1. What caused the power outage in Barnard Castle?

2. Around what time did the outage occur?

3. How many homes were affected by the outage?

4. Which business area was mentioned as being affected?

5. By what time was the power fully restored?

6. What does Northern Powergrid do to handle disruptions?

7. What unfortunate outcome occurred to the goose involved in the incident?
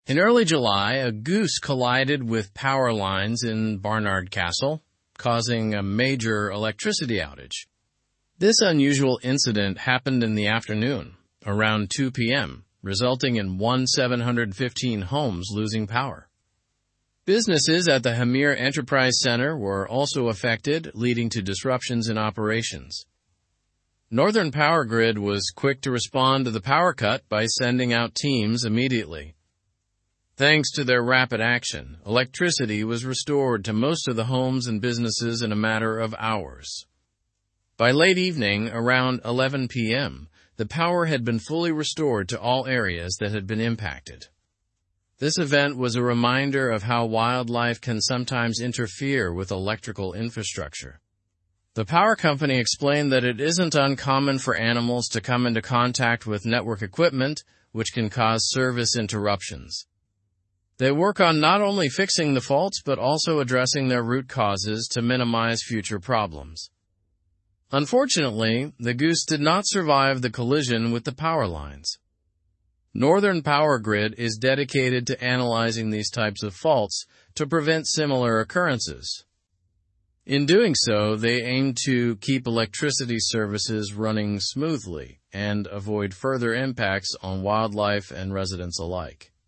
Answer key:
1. A goose collided with the power lines.
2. The outage occurred around 2:00 PM.
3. 1,715 homes were affected by the outage.
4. Hamire Enterprise Centre was mentioned.
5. Power was restored by 11:00 PM.
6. They dispatch teams and assess faults to address root causes.
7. The goose did not survive the collision.

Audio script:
In early July, a goose collided with power lines in Barnard Castle, causing a major electricity outage. This unusual incident happened in the afternoon, around 2:00 PM, resulting in 1,715 homes losing power. Businesses at the Hamire Enterprise Centre were also affected, leading to disruptions in operations.
Northern Powergrid was quick to respond to the power cut by sending out teams immediately. Thanks to their rapid action, electricity was restored to most of the homes and businesses in a matter of hours. By late evening, around 11:00 PM, the power had been fully restored to all areas that had been impacted.
This event was a reminder of how wildlife can sometimes interfere with electrical infrastructure. The power company explained that it isn't uncommon for animals to come into contact with network equipment, which can cause service interruptions. They work on not only fixing the faults but also addressing their root causes to minimize future problems.
Unfortunately, the goose did not survive the collision with the power lines. Northern Powergrid is dedicated to analyzing these types of faults to prevent similar occurrences. In doing so, they aim to keep electricity services running smoothly and avoid further impacts on wildlife and residents alike.

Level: Level 3